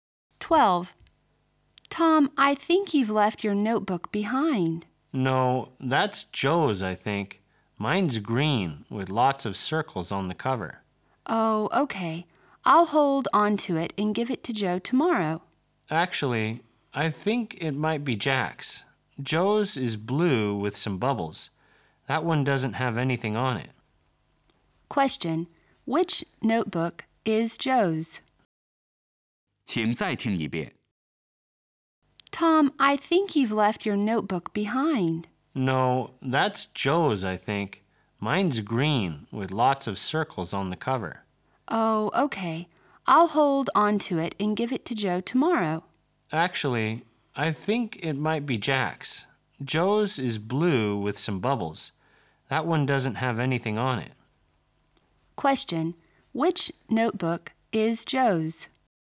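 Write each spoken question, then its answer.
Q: which notebook is Joe's?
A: The blue one with some bubbles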